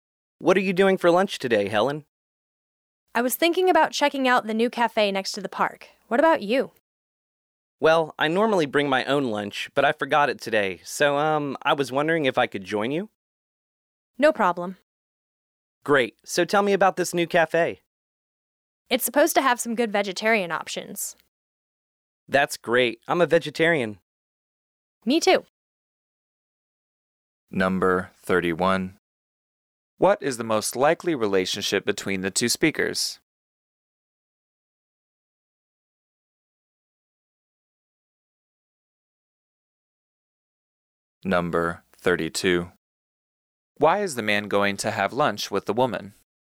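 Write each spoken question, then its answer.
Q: Why is the man going to have lunch with the woman?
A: He forgot his own lunch today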